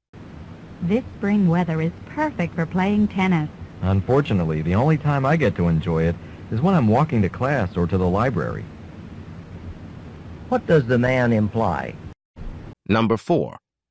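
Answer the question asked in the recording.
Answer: He's too busy to play tennis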